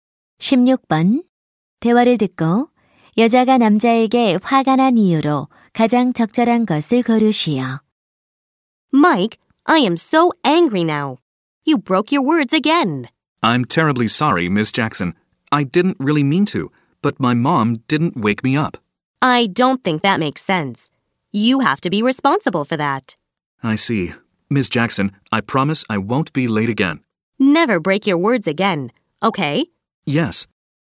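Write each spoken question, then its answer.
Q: 대화를 듣고 여자가 남자에게 화가 난 이유로 가장 적절한 것을 고르시오.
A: 남자가 또 지각해서 약속을 어겼기 때문에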